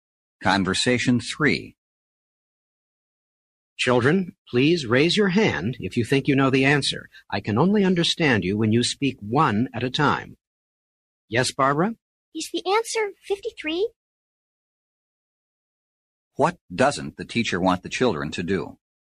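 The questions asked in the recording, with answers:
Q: What doesn't the teacher want the children to do?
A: Speak all at once.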